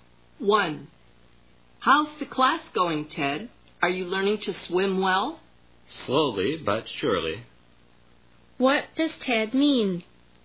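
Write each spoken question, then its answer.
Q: What does Ted mean?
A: He is making slow but steady progress in learning to swim.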